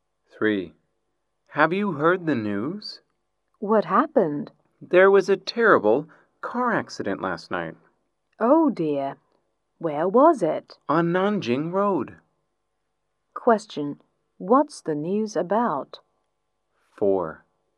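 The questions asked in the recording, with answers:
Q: What's the news about?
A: A terrible car accident on Nanjing Road last night.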